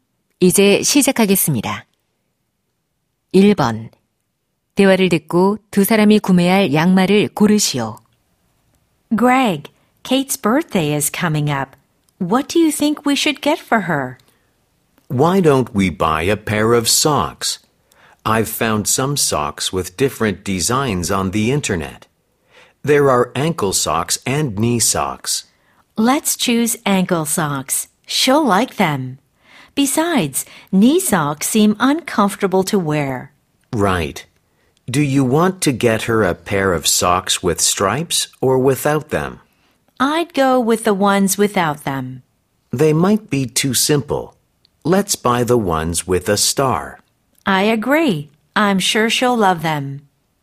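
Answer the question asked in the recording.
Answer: 별 무늬가 있는 발목 양말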